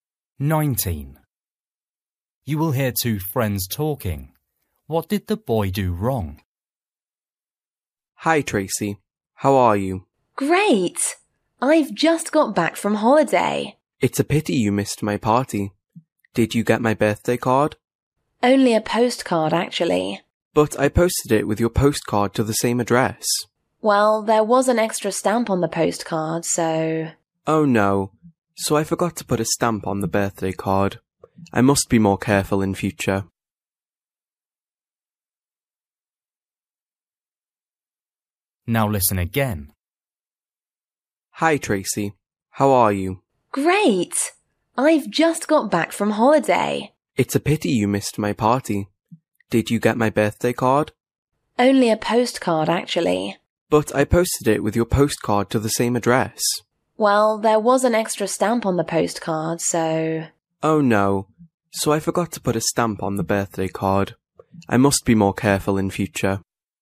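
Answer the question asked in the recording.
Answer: He forgot to put a stamp on the birthday card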